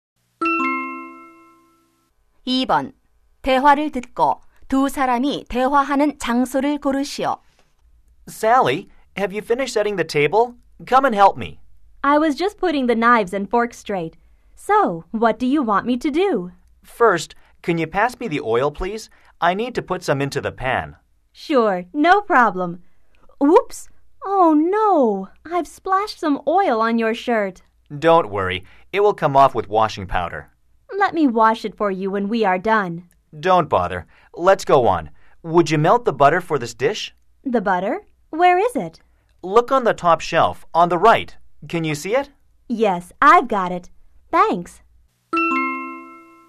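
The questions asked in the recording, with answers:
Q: 대화를 듣고 두 사람이 대화하는 장소를 고르시오.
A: 부엌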